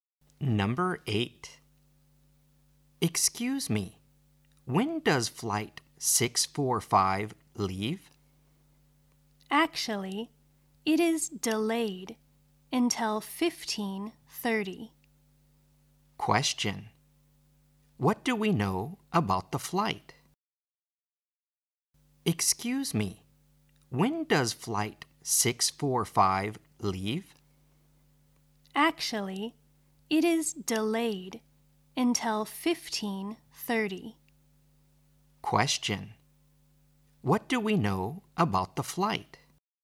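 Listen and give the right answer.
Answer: It is delayed until 15:30.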